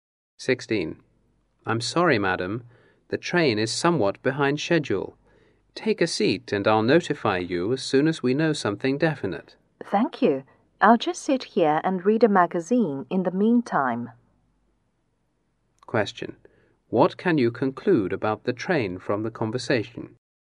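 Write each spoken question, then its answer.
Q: What can you conclude about the train from the conversation?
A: It is late.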